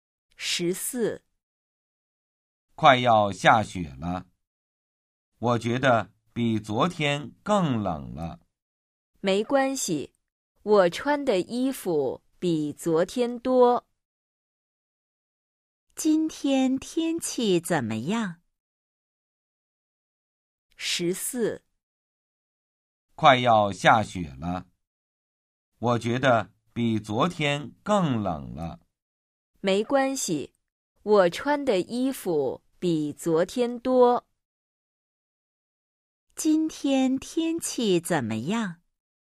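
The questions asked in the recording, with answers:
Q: 今天天气怎么样?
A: 比昨天更冷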